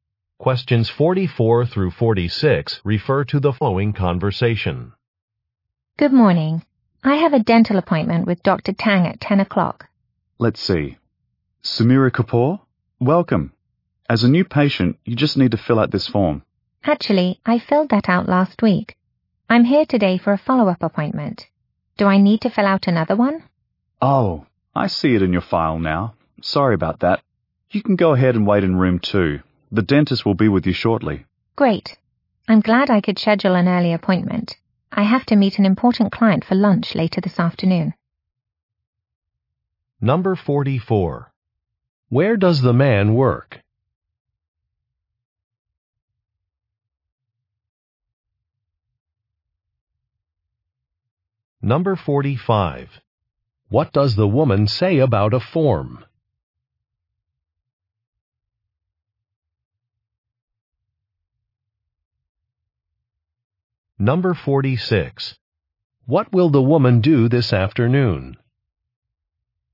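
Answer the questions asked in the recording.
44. At a dental office
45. She already filled it out last week
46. Meet an important client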